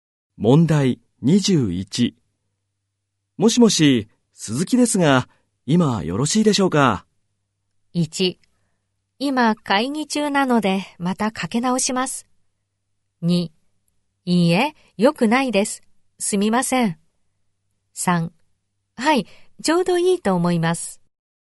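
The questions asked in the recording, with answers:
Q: もしもし、鈴木ですが、今よろしいでしょうか。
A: 1: 今会議中なので、またかけ直します。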